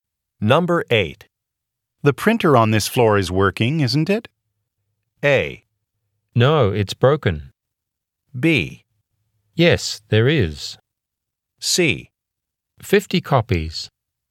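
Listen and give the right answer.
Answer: A: No, it's broken.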